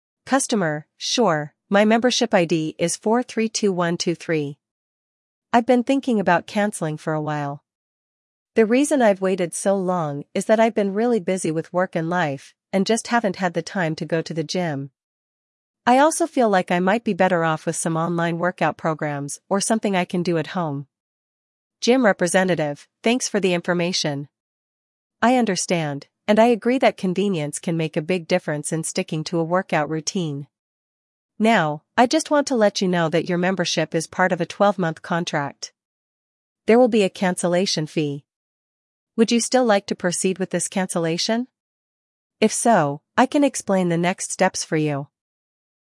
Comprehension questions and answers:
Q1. What fitness option is the customer considering instead of the gym?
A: Online workout programs or home workouts

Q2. What type of membership does the customer have?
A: Annual contract

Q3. What is the cancellation fee associated with the membership?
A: A cancellation fee because of the 12-month contract

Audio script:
Customer: "Sure, my membership ID is 432123. I've been thinking about canceling for a while. The reason I've waited so long is that I've been really busy with work and life, and just haven't had the time to go to the gym. I also feel like I might be better off with some online workout programs or something I can do at home."
Gym Representative: "Thanks for the information. I understand, and I agree that convenience can make a big difference in sticking to a workout routine. Now, I just want to let you know that your membership is part of a 12-month contract. There will be a cancellation fee. Would you still like to proceed with this cancellation? If so, I can explain the next steps for you."